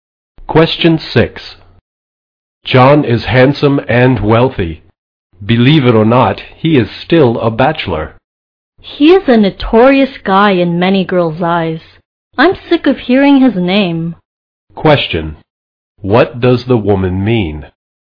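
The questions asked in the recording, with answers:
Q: What does the woman mean?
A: She dislikes John and is tired of hearing about him.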